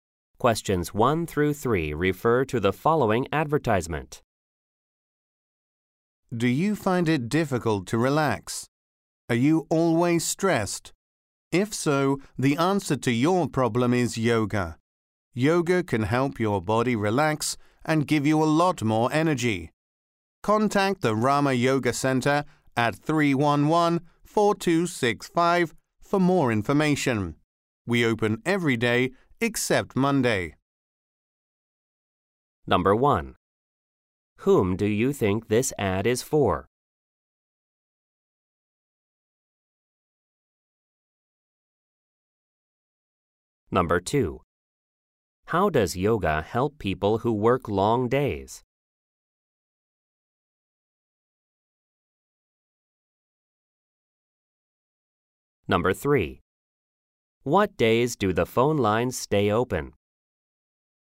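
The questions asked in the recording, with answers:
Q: Whom do you think this ad is for?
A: People who are stressed and can't relax

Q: How does yoga help people who work long days?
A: It helps them relax and gives them more energy

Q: What days do the phone lines stay open?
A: Every day except Monday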